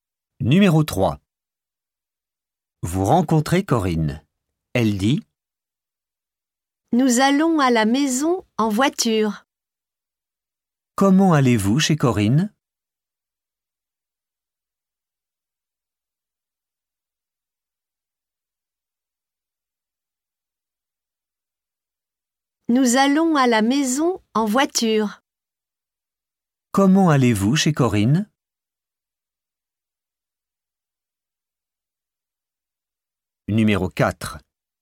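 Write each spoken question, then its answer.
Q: Comment allez-vous chez Corinne ?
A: En voiture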